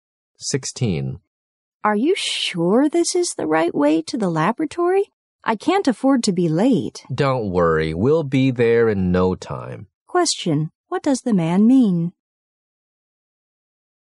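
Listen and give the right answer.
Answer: They will get to the laboratory very soon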